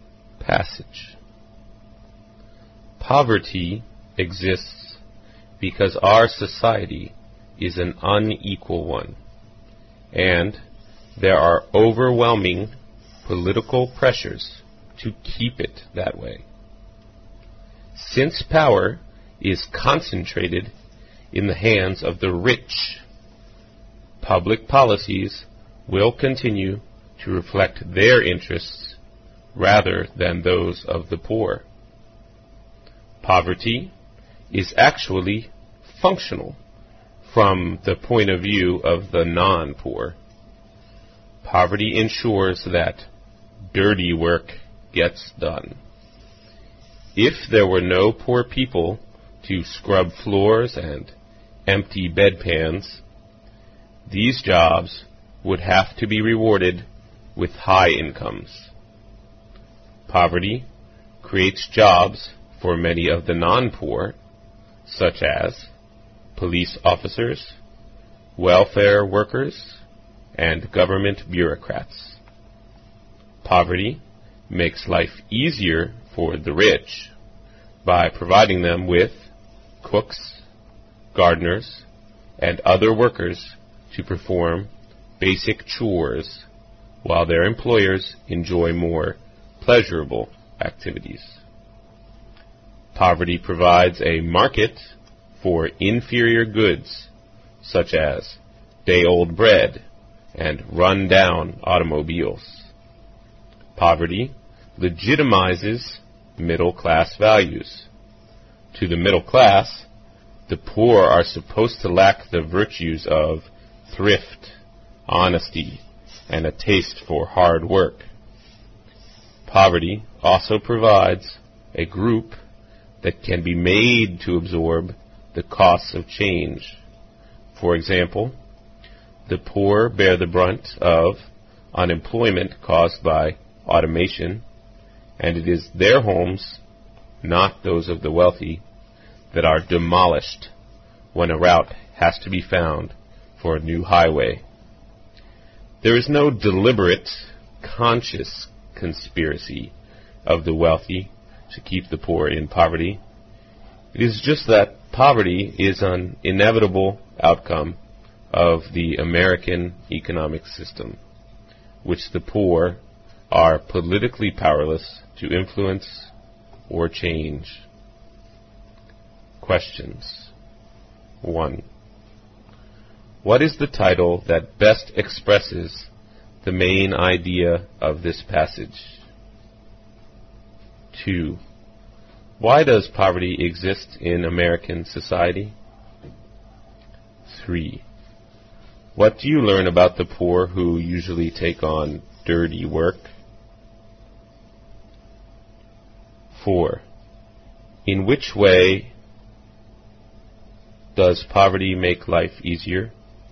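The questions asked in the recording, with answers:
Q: Why does poverty exist in American society?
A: Because society is unequal and political pressures keep it that way.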